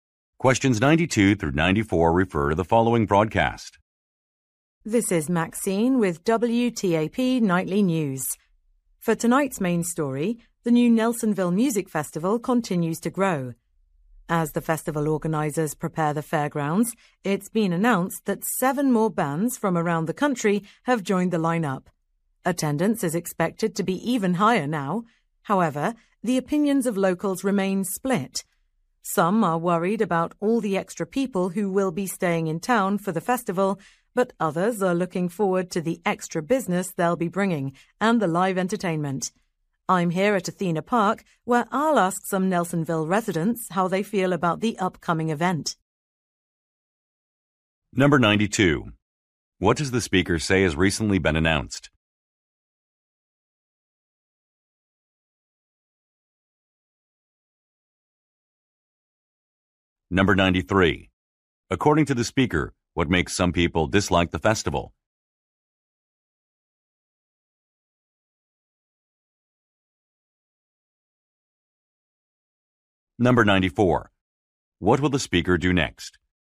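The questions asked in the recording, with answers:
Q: What does the speaker say has recently been announced?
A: Seven more bands have joined the lineup

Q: According to the speaker, what makes some people dislike the festival?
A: Extra people staying in town

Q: What will the speaker do next?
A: Interview local residents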